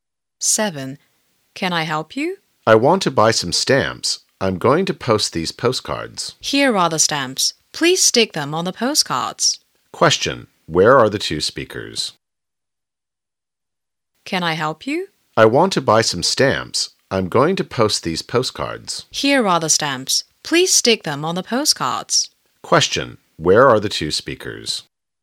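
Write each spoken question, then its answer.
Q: Where are the two speakers?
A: At the post office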